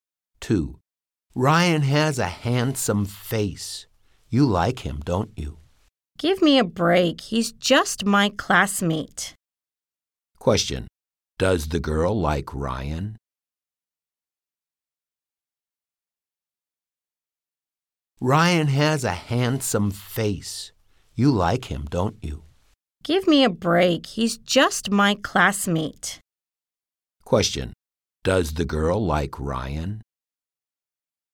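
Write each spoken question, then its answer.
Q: Question, does the girl like Ryan?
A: No, he's just her classmate.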